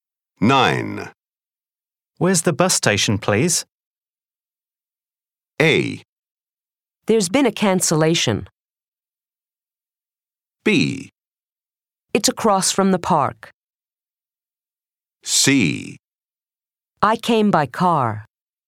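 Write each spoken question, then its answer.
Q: Where's the bus station, please?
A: B: It's across from the park.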